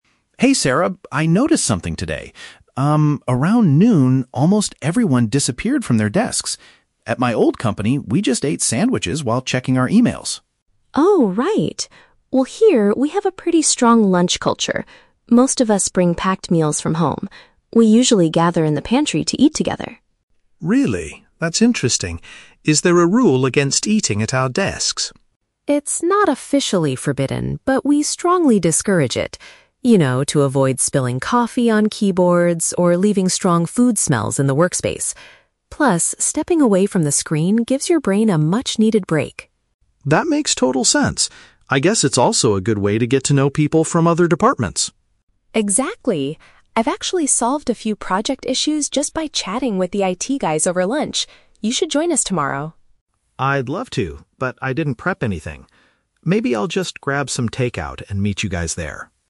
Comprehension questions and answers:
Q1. Why do the employees prefer eating in the pantry instead of at their desks?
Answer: To maintain a clean workspace and mentally rest.

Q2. According to Sarah, what is a hidden benefit of eating in the shared area?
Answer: She can build cross-departmental relationships and resolve work problems.

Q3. What will Mark most likely do for lunch tomorrow?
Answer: Buy some ready-made food and join his colleagues in the pantry.

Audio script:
Mark: Hey Sarah, I noticed something today. Um, around noon, almost everyone disappeared from their desks. At my old company, we just ate sandwiches while checking our emails.
Sarah: Oh, right! Well, here, we have a pretty strong lunch culture. Most of us bring packed meals from home. We usually gather in the pantry to eat together.
Mark: Really? That's interesting. Is there a rule against eating at our desks?
Sarah: It's not officially forbidden, but we strongly discourage it. You know, to avoid spilling coffee on keyboards or leaving strong food smells in the workspace. Plus, stepping away from the screen gives your brain a much-needed break.
Mark: That makes total sense. I guess it's also a good way to get to know people from other departments.
Sarah: Exactly! I've actually solved a few project issues just by chatting with the IT guys over lunch. You should join us tomorrow!
Mark: I'd love to, but I didn't prep anything. Maybe I'll just grab some takeout and meet you guys there.